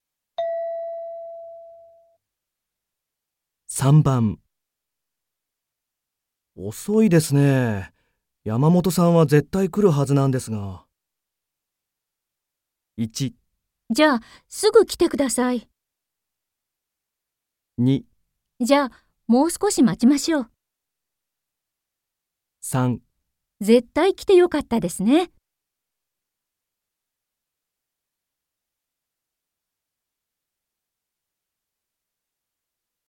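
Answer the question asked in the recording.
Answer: じゃ、もう少し待ちましょう。

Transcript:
M:遅いですね。山本さんは絶対来るはずなんですが...。
F:1 じゃ、すぐ来てください。
2 じゃ、もう少し待ちましょう。
3 絶対来てよかったですね。

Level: N3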